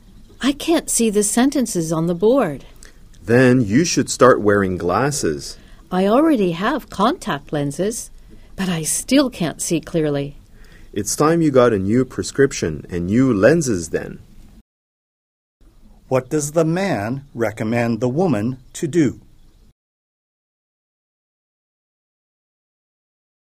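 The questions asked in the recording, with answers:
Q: What does the man recommend the woman to do?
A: Get a new prescription and new lenses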